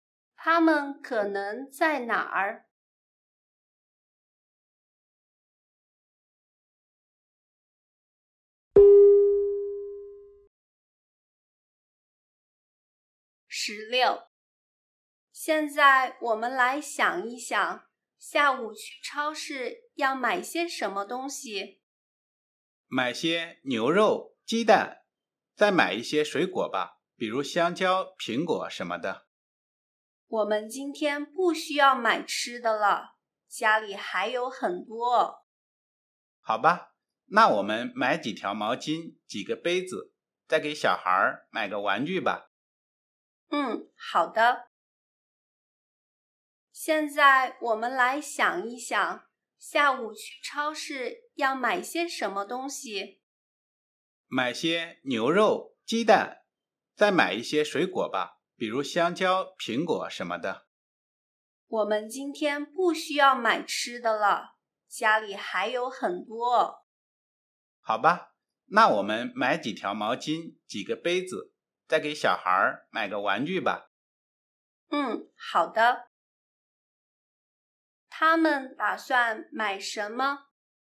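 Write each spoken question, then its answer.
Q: 他们打算买什么?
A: 毛巾、杯子和玩具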